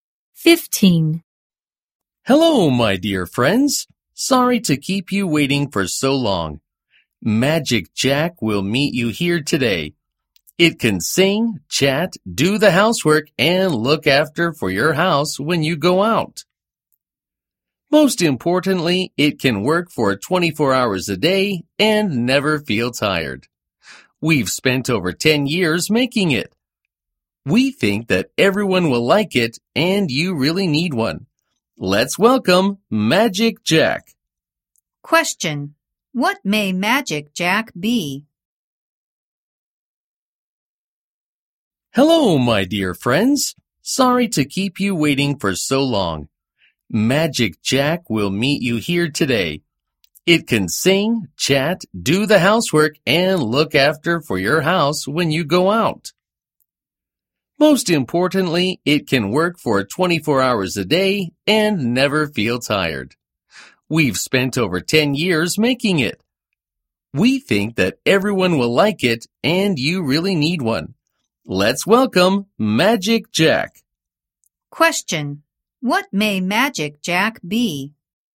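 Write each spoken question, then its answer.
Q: What may Magic Jack be?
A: A robot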